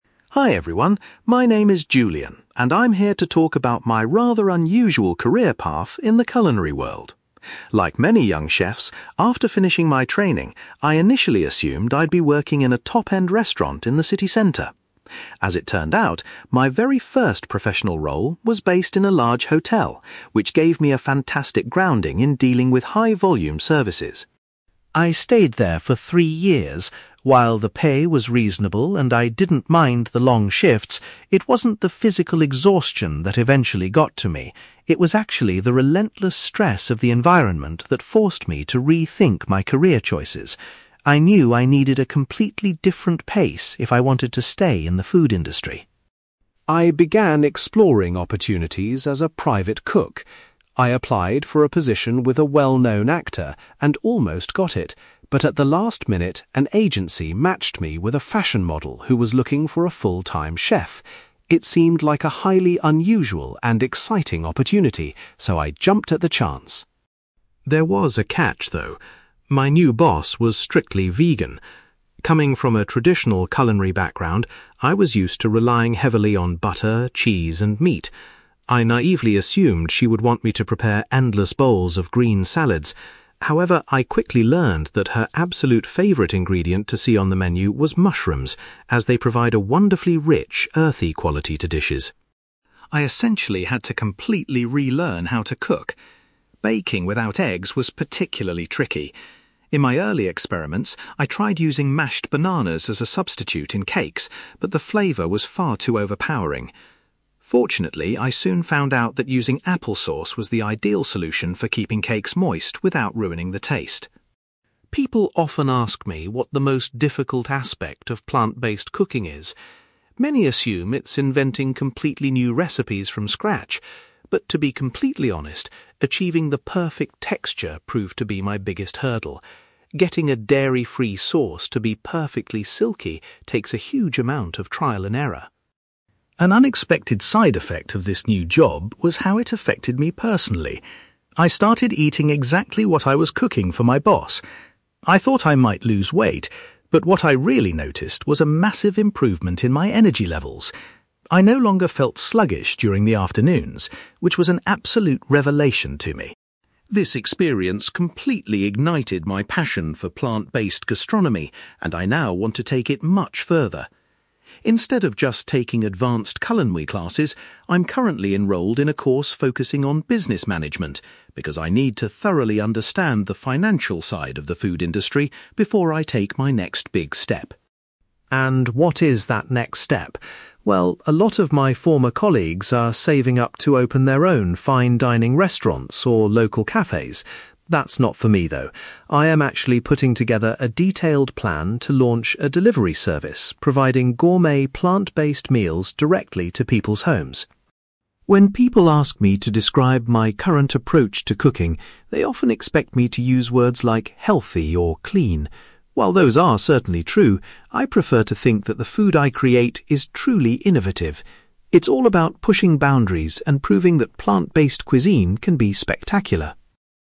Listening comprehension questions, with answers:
You will hear a young chef called Julian talking about his career and his passion for plant-based cooking. For questions 9-18, complete the sentences with a word or short phrase.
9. Julian had anticipated finding a job in a restaurant, but actually started his career working in a (9)........................... .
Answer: hotel

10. Julian says that the (10)........................... he experienced made him decide to leave his first job.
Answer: stress

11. Julian was hired to be a private chef for a (11)........................... rather than an actor.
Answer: fashion model

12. Julian was surprised to discover that his new employer particularly enjoyed eating (12)........................... .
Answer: mushrooms

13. When baking vegan cakes, Julian found that (13)........................... was a better egg substitute than bananas.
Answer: applesauce

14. Julian states that getting the (14)........................... of plant-based dishes right was his greatest challenge.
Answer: texture

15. Julian was pleased to find that eating a plant-based diet significantly boosted his (15)........................... .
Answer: energy levels

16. Julian has decided to study (16)........................... to prepare for his future career plans.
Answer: business management

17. Unlike his friends who want to open restaurants, Julian's ambition is to start a (17)........................... .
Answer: delivery service

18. Julian chooses to use the word (18)........................... to describe his current cooking style.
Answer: innovative

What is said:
Julian: Hi everyone, my name is Julian, and I'm here to talk about my rather unusual career path in the culinary world. Like many young chefs, after finishing my training, I initially assumed I'd be working in a top-end restaurant in the city centre. As it turned out, my very first professional role was based in a large hotel, which gave me a fantastic grounding in dealing with high-volume services.
I stayed there for three years. While the pay was reasonable and I didn't mind the long shifts, it wasn't the physical exhaustion that eventually got to me. It was actually the relentless stress of the environment that forced me to rethink my career choices. I knew I needed a completely different pace if I wanted to stay in the food industry.
I began exploring opportunities as a private cook. I applied for a position with a well-known actor and almost got it, but at the last minute, an agency matched me with a fashion model who was looking for a full-time chef. It seemed like a highly unusual and exciting opportunity, so I jumped at the chance.
There was a catch, though. My new boss was strictly vegan. Coming from a traditional culinary background, I was used to relying heavily on butter, cheese, and meat. I naively assumed she would want me to prepare endless bowls of green salads. However, I quickly learned that her absolute favourite ingredient to see on the menu was mushrooms, as they provide a wonderfully rich, earthy quality to dishes.
I essentially had to completely relearn how to cook. Baking without eggs was particularly tricky. In my early experiments, I tried using mashed bananas as a substitute in cakes, but the flavour was far too overpowering. Fortunately, I soon found out that using applesauce was the ideal solution for keeping cakes moist without ruining the taste.
People often ask me what the most difficult aspect of plant-based cooking is. Many assume it's inventing completely new recipes from scratch. But to be completely honest, achieving the perfect texture proved to be my biggest hurdle. Getting a dairy-free sauce to be perfectly silky takes a huge amount of trial and error!
An unexpected side effect of this new job was how it affected me personally. I started eating exactly what I was cooking for my boss. I thought I might lose weight, but what I really noticed was a massive improvement in my energy levels. I no longer felt sluggish during the afternoons, which was an absolute revelation to me.
This experience completely ignited my passion for plant-based gastronomy, and I now want to take it much further. Instead of just taking advanced culinary classes, I'm currently enrolled in a course focusing on business management, because I need to thoroughly understand the financial side of the food industry before I take my next big step.
And what is that next step? Well, a lot of my former colleagues are saving up to open their own fine-dining restaurants or local cafes. That's not for me, though. I am actually putting together a detailed plan to launch a delivery service providing gourmet, plant-based meals directly to people's homes.
When people ask me to describe my current approach to cooking, they often expect me to use words like 'healthy' or 'clean'. While those are certainly true, I prefer to think that the food I create is truly innovative. It's all about pushing boundaries and proving that plant-based cuisine can be spectacular.

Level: B2